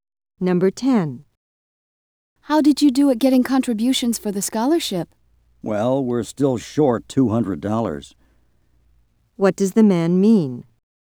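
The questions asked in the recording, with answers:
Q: What does the man mean?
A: They still need $200 more for the scholarship.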